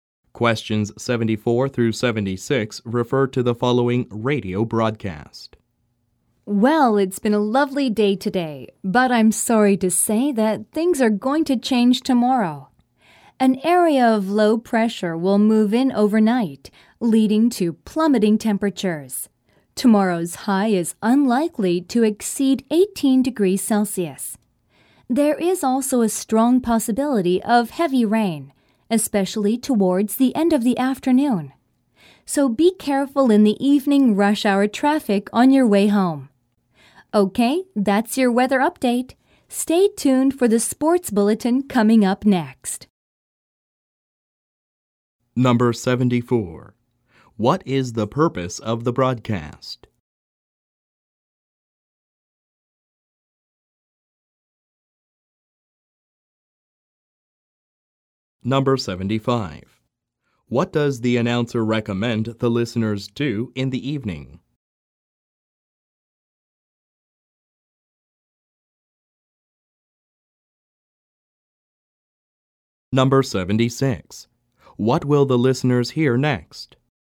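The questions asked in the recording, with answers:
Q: What is the purpose of the broadcast?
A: To give a weather forecast

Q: What does the announcer recommend the listeners do in the evening?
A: Be careful in the rush hour traffic on the way home

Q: What will the listeners hear next?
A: The sports bulletin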